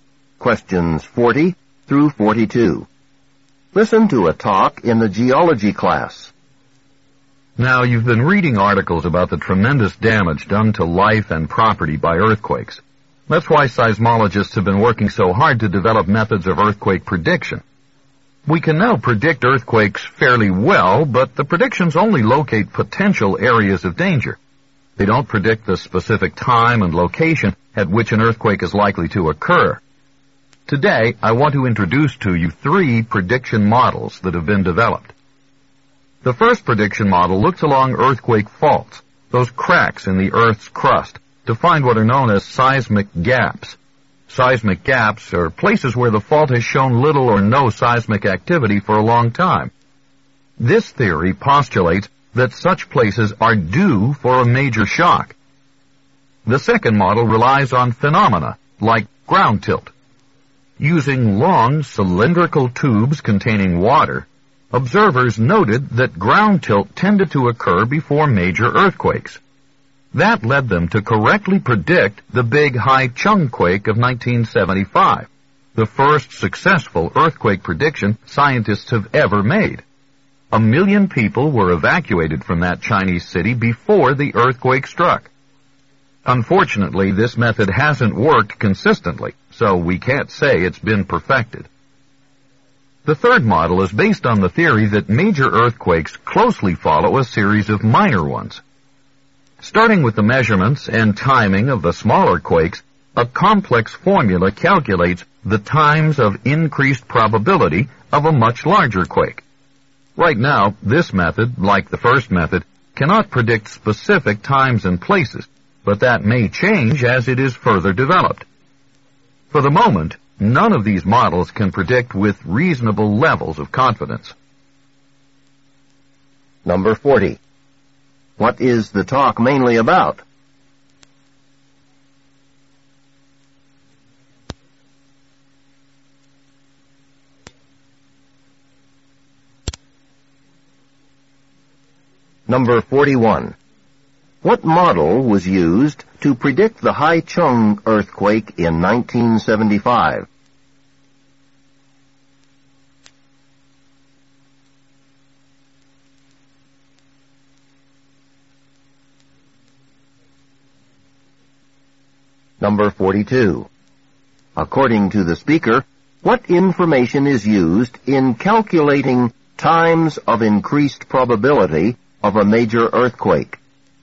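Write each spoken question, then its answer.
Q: What is the talk mainly about?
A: Models for predicting earthquakes

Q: What model was used to predict the Haichung earthquake in 1975?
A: The ground tilt model

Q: According to the speaker, what information is used in calculating times of increased probability of a major earthquake?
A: The measurements and timing of smaller quakes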